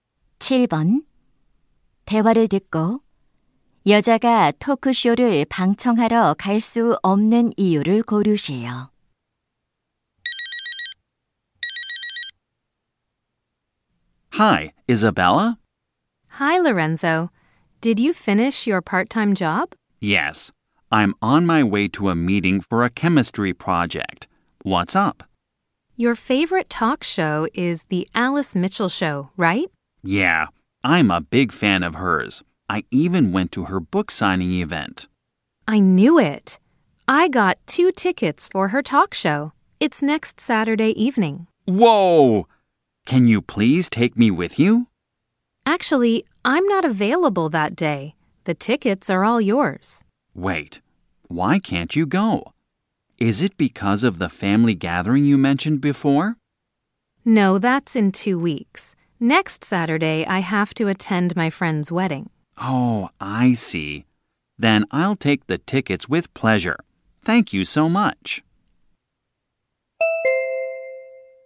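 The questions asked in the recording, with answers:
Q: 대화를 듣고 여자가 토크쇼를 방청하러 갈 수 없는 이유를 고르세요.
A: 친구 결혼식에 참석해야 해서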